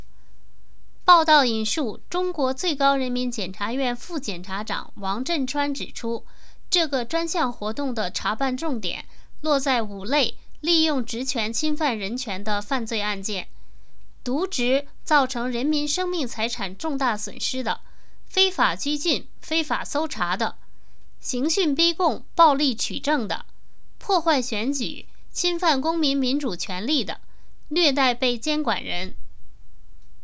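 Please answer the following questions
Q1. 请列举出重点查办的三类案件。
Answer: 渎职造成人民生命财产重大损失的;非法拘禁、非法搜查的;刑讯逼供、暴力取证的(另有破坏选举、侵犯公民民主权利的,虐待被监管人的)

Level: 3rd Year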